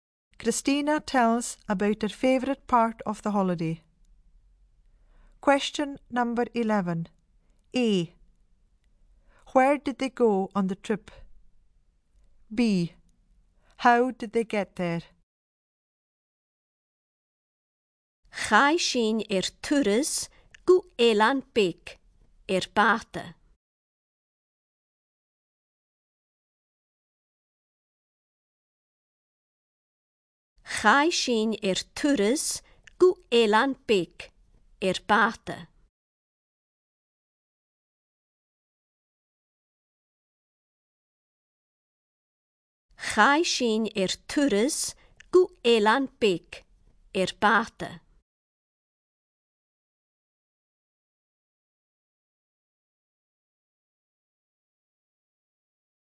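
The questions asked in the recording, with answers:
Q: Where did they go on the trip?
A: To an island

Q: How did they get there?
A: By boat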